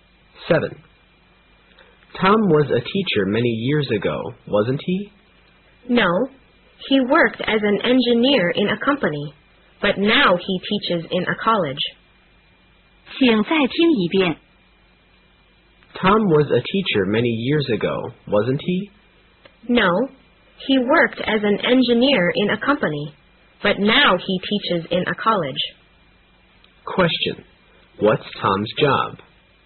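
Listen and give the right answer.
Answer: He is a teacher in a college.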